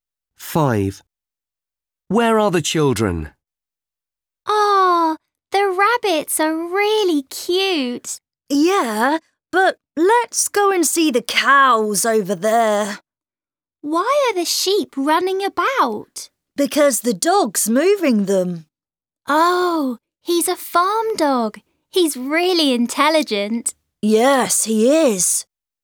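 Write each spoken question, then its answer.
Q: Where are the children?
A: On a farm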